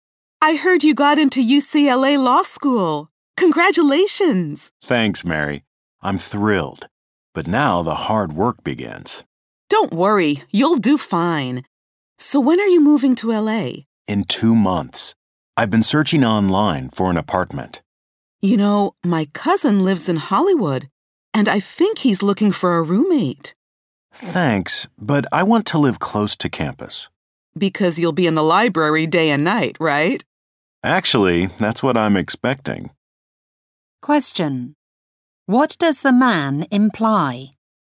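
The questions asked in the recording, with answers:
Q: What does the man imply?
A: He expects to study very hard, so he wants to live near campus.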